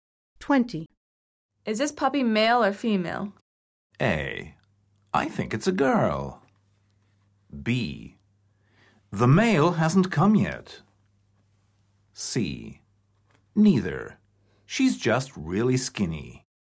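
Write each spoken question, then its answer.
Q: Is this puppy male or female?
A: A: I think it's a girl.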